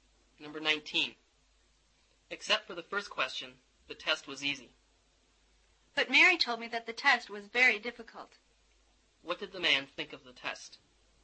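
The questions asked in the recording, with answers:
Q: What did the man think of the test?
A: It was easy except for the first question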